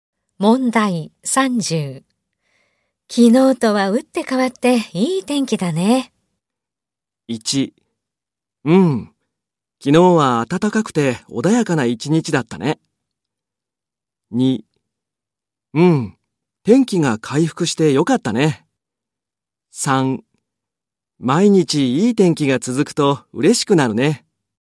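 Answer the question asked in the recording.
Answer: 2: うん、天気が回復してよかったね。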